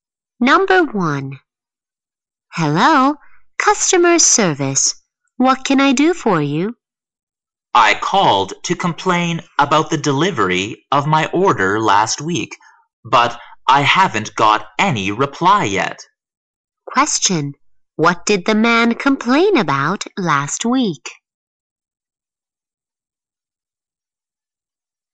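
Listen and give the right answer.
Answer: The delivery of his order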